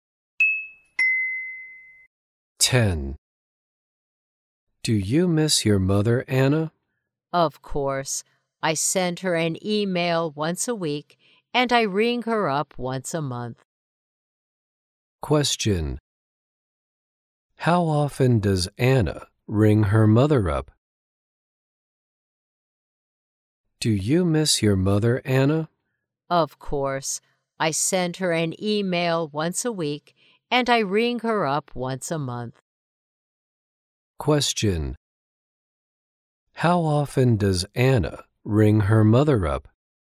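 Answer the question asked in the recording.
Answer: Once a month.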